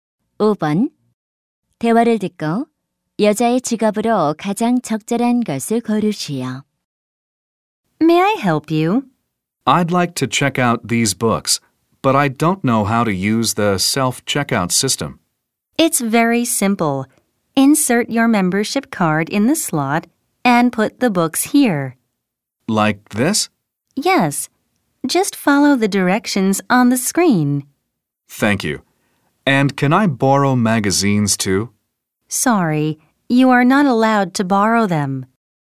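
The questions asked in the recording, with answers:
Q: 대화를 듣고 여자의 직업으로 가장 적절한 것을 고르시오.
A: 도서관 사서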